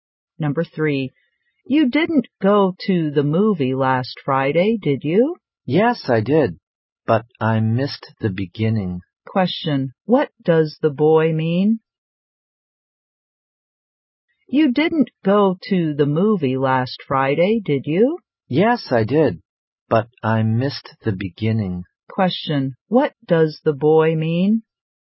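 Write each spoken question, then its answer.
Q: Question, what does the boy mean?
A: He went to the movie but arrived late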